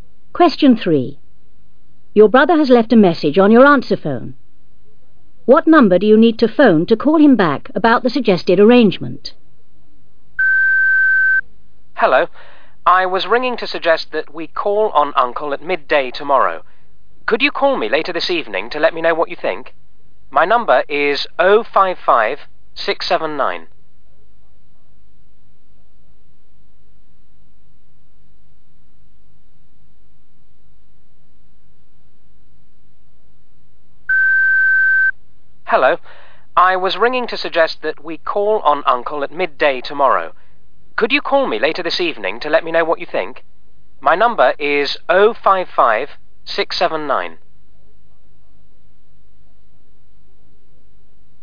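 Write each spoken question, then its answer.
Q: What number do you need to phone to call him back about the suggested arrangement?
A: 055-679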